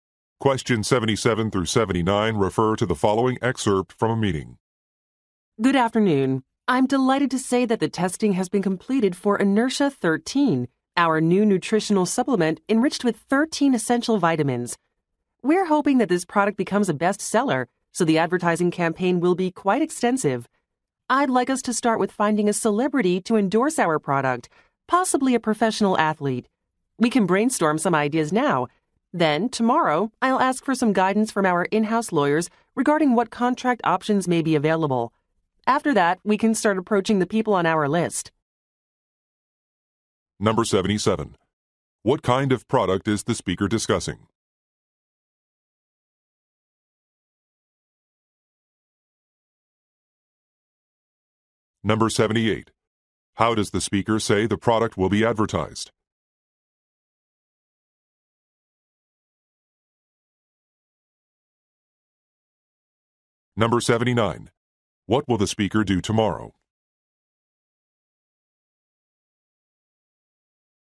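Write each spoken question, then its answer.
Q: What kind of product is the speaker discussing?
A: A nutritional supplement

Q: How does the speaker say the product will be advertised?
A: With a celebrity endorsement, possibly a professional athlete

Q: What will the speaker do tomorrow?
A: Ask the in-house lawyers for advice on contract options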